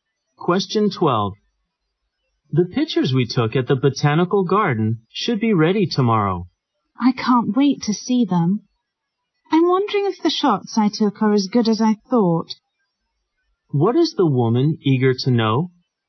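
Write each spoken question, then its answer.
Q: What is the woman eager to know?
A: Whether her photos are as good as she thought.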